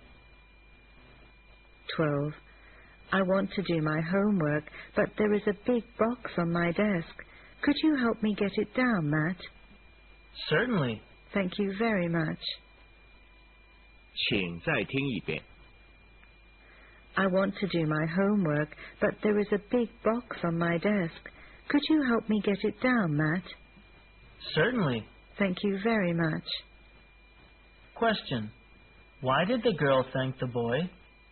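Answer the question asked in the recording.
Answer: He helped her get the big box down from her desk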